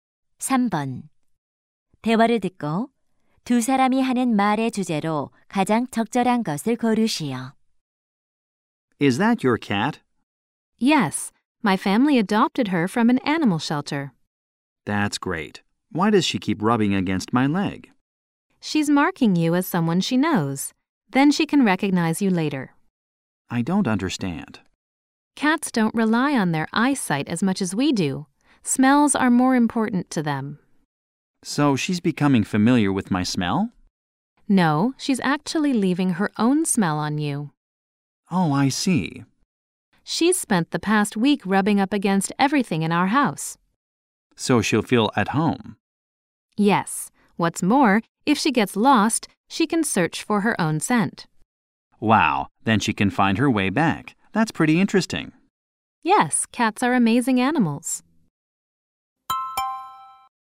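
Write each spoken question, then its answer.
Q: 대화를 듣고 두 사람이 하는 말의 주제로 가장 적절한 것을 고르시오.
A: 고양이가 몸을 비벼 자기 냄새를 남기는 이유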